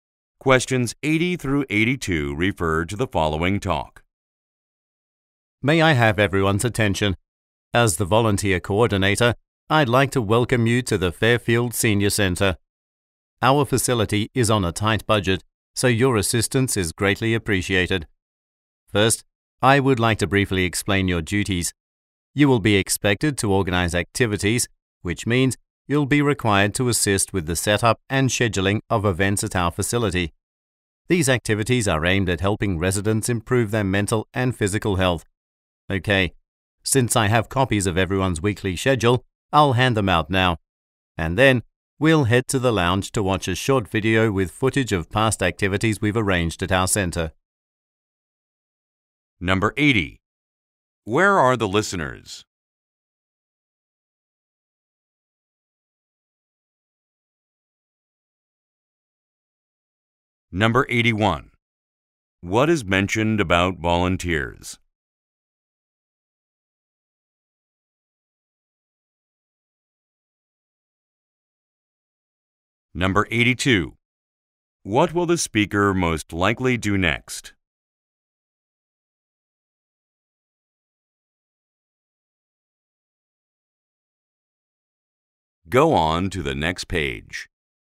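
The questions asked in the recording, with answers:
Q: Where are the listeners?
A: At a senior center

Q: What will the speaker most likely do next?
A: Hand out weekly schedules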